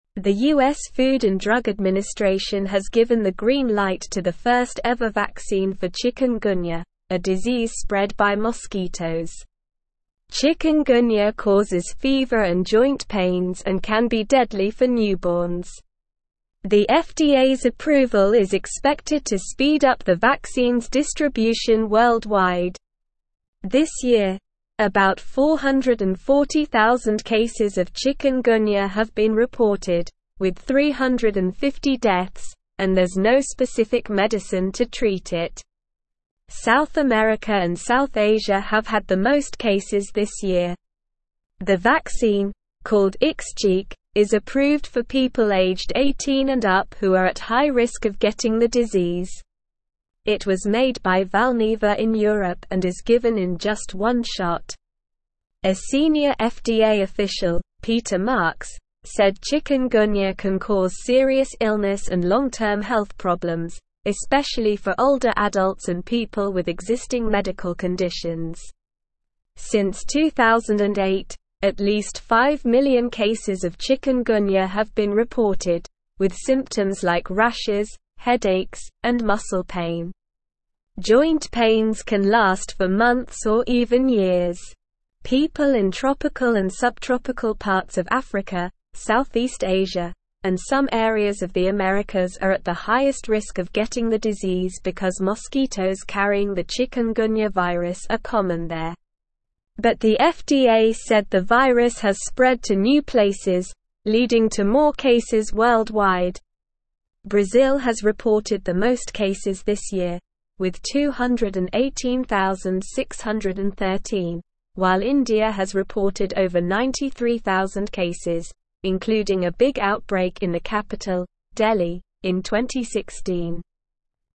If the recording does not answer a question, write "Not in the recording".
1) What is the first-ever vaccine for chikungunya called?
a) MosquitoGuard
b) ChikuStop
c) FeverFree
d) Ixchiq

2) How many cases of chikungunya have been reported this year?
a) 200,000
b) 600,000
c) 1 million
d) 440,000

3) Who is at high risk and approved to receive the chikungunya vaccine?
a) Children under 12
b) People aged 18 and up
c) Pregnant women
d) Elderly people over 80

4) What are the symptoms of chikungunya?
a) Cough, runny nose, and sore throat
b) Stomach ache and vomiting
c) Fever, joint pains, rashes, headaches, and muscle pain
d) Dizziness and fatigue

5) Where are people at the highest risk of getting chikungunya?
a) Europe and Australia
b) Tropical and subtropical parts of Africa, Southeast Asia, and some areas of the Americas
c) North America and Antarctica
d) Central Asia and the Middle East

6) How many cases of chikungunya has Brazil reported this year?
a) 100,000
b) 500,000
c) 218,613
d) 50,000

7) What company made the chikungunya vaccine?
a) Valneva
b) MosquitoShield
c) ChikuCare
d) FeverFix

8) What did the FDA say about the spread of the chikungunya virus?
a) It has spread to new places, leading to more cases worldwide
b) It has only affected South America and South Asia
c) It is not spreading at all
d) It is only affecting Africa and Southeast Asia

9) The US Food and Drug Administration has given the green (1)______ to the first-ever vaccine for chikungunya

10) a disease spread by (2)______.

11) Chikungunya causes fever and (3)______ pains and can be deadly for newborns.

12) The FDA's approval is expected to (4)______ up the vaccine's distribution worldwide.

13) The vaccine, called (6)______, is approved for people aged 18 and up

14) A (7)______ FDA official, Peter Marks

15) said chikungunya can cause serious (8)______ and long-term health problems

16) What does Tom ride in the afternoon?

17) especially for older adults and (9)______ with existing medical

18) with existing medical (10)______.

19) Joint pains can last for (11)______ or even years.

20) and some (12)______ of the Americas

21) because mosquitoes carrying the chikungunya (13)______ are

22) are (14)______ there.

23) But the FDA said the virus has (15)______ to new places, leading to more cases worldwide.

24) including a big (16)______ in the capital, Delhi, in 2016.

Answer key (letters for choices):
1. d
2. d
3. b
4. c
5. b
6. c
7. a
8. a
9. light
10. mosquitoes
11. joint
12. speed
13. Ixchiq
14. senior
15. illness
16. Not in the recording
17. people
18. conditions
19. months
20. areas
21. virus
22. common
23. spread
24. outbreak

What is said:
The US Food and Drug Administration has given the green light to the first-ever vaccine for chikungunya, a disease spread by mosquitoes. Chikungunya causes fever and joint pains and can be deadly for newborns. The FDA's approval is expected to speed up the vaccine's distribution worldwide. This year, about 440,000 cases of chikungunya have been reported, with 350 deaths, and there's no specific medicine to treat it. South America and South Asia have had the most cases this year.
The vaccine, called Ixchiq, is approved for people aged 18 and up who are at high risk of getting the disease. It was made by Valneva in Europe and is given in just one shot. A senior FDA official, Peter Marks, said chikungunya can cause serious illness and long-term health problems, especially for older adults and people with existing medical conditions. Since 2008, at least five million cases of chikungunya have been reported, with symptoms like rashes, headaches, and muscle pain. Joint pains can last for months or even years.
People in tropical and subtropical parts of Africa, Southeast Asia, and some areas of the Americas are at the highest risk of getting the disease because mosquitoes carrying the chikungunya virus are common there. But the FDA said the virus has spread to new places, leading to more cases worldwide. Brazil has reported the most cases this year, with 218,613, while India has reported over 93,000 cases, including a big outbreak in the capital, Delhi, in 2016.

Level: Level 3